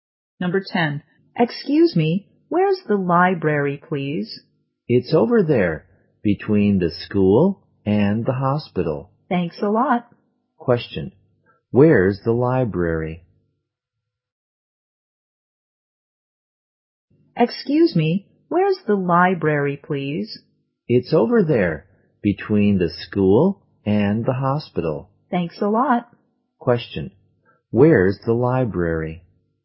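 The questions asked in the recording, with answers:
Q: Question. Where's the library?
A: Between the school and the hospital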